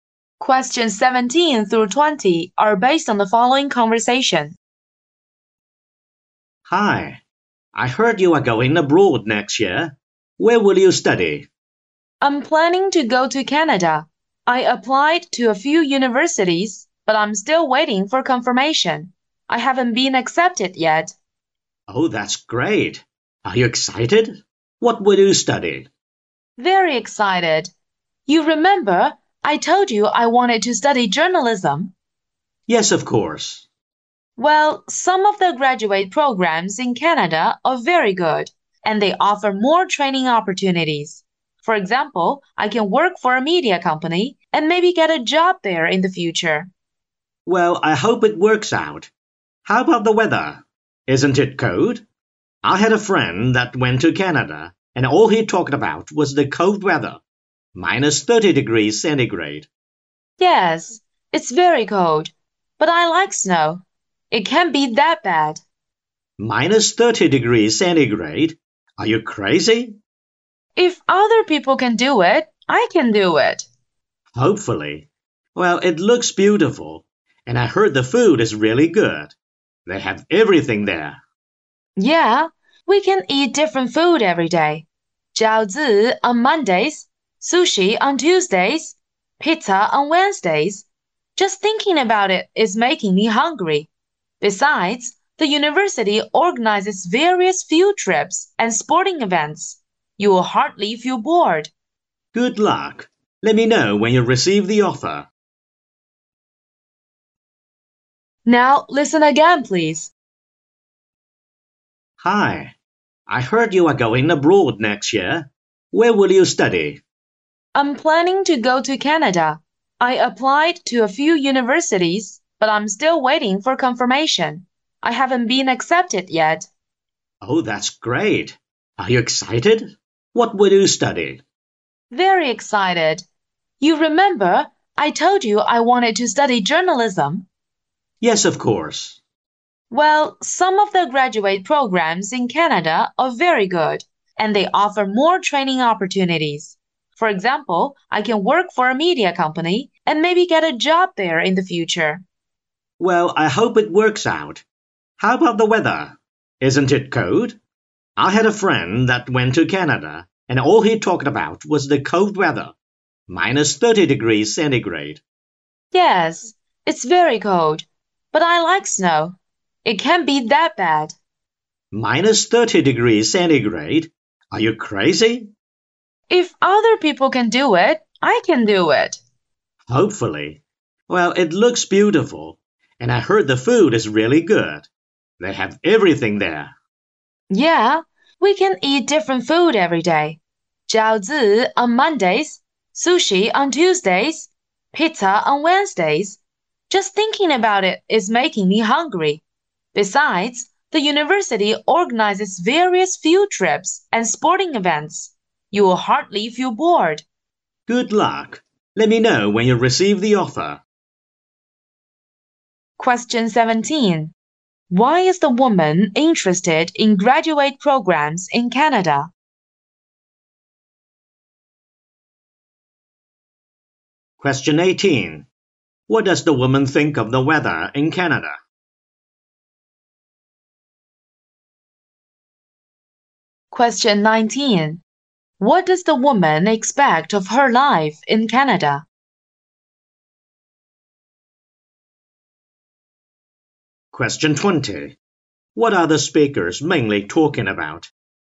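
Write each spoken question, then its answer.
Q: Why is the woman interested in graduate programs in Canada?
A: They offer more training opportunities

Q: What does the woman think of the weather in Canada?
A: It's very cold but not that bad

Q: What are the speakers mainly talking about?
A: The woman's plan to study in Canada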